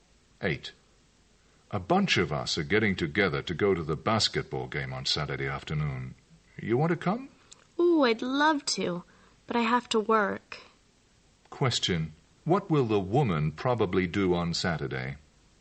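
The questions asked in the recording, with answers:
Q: What will the woman probably do on Saturday?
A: Work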